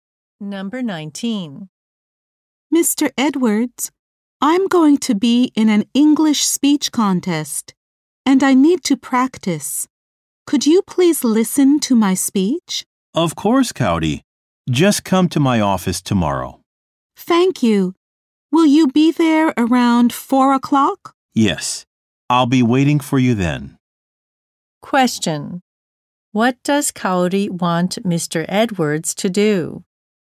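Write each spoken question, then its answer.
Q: What does Cowdy want Mr.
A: Listen to her speech.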